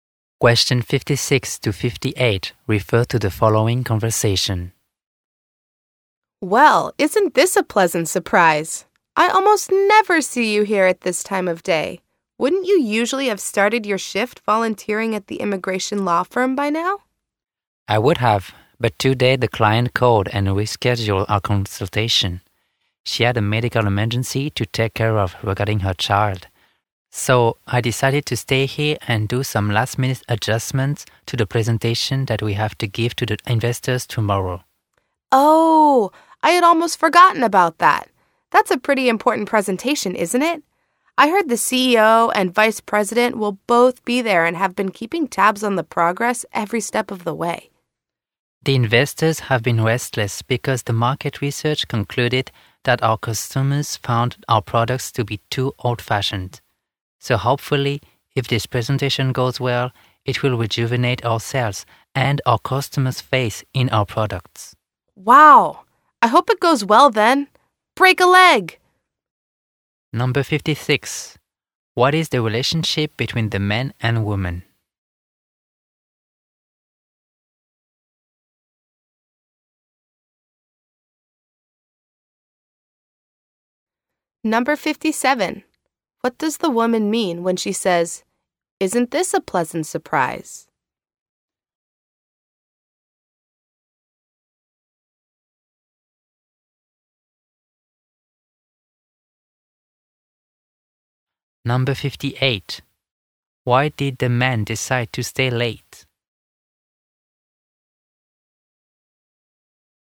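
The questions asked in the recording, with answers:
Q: What does the woman mean when she says, "Isn't this a pleasant surprise?"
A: She rarely sees him there at that time of day

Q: Why did the man decide to stay late?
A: His client rescheduled, so he is adjusting the investor presentation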